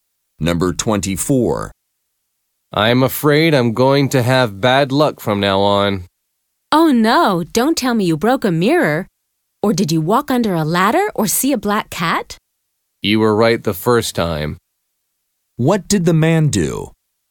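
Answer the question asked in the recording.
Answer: Broke a mirror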